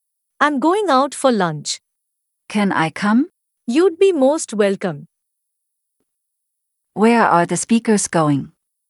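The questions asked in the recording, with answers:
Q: Where are the speakers going?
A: Out for lunch.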